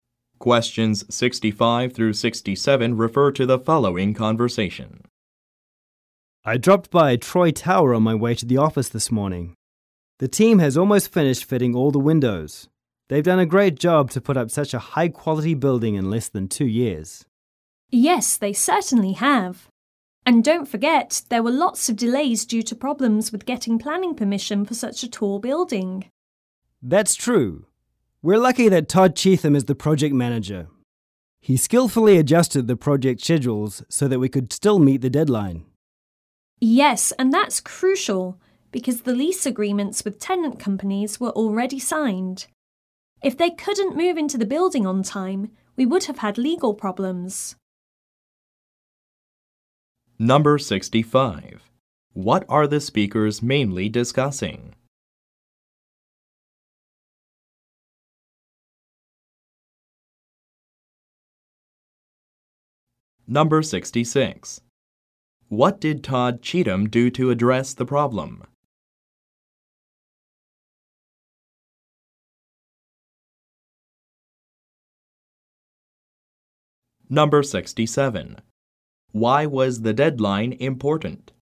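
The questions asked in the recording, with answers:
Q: What are the speakers mainly discussing?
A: The construction of Troy Tower

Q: What did Todd Cheatham do to address the problem?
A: He adjusted the project schedules

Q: Why was the deadline important?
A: Lease agreements with tenant companies were already signed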